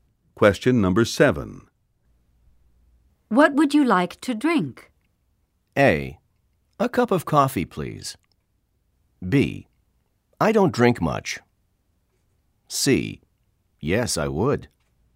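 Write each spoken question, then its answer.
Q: What would you like to drink?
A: A: A cup of coffee, please.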